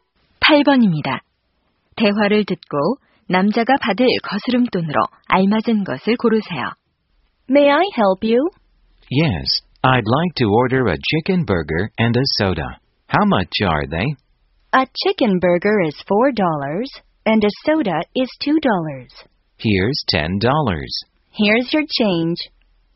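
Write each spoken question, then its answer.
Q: 대화를 듣고 남자가 받을 거스름돈으로 알맞은 것을 고르세요.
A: 4달러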